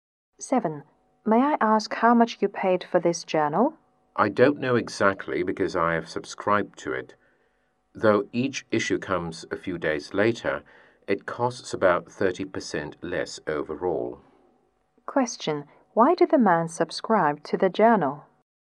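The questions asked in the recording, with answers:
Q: Why did the man subscribe to the journal?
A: It costs about 30% less overall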